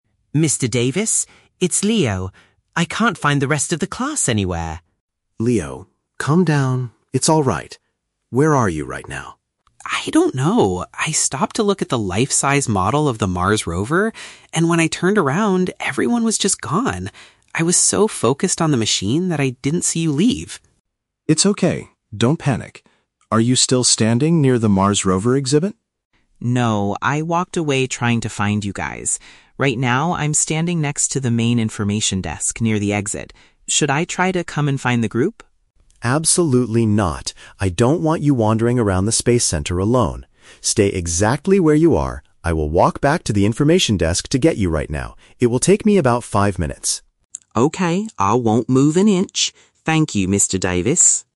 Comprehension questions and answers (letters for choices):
Listen to a phone conversation between a student and his teacher on a school trip. Choose the correct answer (A, B, or C) for each question.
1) Why did the student get separated from his classmates?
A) He spent too much time observing a space vehicle display.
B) He stopped to buy some souvenirs at the museum shop.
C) He was trying to take a picture of the planetarium ceiling.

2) Where is the student standing right now?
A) Right next to the large Mars Rover exhibition.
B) Beside a customer service counter.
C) Outside the museum's main exit doors.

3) What instruction does the teacher give the student?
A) To ask the building staff for directions to the rest of the class.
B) To return to the area where he first lost the group.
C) To remain in his current position until help arrives.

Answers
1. A
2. B
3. C

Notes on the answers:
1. Leo says he "stopped to look at the life-size model of the Mars Rover" and was "so focused on the machine." Option (A) perfectly paraphrases this ("space vehicle display" = model of the Mars Rover, "observing" = looking at). Option (B) and Option (C) are plausible things to do on a field trip, but neither is mentioned in the audio.
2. Leo states, "Right now, I'm standing next to the main information desk." Option (B) uses synonyms to express this location ("beside" = next to, "customer service counter" = information desk). Option (A) is a trap; the "Mars Rover" is mentioned, but Leo explicitly says he "walked away" from it. Option (C) is a trap; the "exit" is mentioned, but he is near it inside the building at the desk, not outside the doors.
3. Mr. Davis tells Leo to "Stay exactly where you are" and says "I will walk back... to get you right now." Option (C) accurately paraphrases this ("remain in his current position" = stay exactly where you are). Option (B) is a trap; he asks if Leo is still at the first area (Mars Rover), but tells him not to wander around anymore. Option (A) is a trap; Leo is at the information desk, but Mr. Davis does not tell him to ask the staff for directions.

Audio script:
Leo: Mr. Davis? It's Leo. I can't find the rest of the class anywhere!
Mr. Davis: Leo, calm down. It's alright. Where are you right now?
Leo: I don't know. I stopped to look at the life-size model of the Mars Rover, and when I turned around, everyone was just gone. I was so focused on the machine that I didn't see you leave.
Mr. Davis: It's okay, don't panic. Are you still standing near the Mars Rover exhibit?
Leo: No, I walked away trying to find you guys. Right now, I'm standing next to the main information desk near the exit. Should I try to come and find the group?
Mr. Davis: Absolutely not. I don't want you wandering around the space center alone. Stay exactly where you are. I will walk back to the information desk to get you right now. It will take me about five minutes.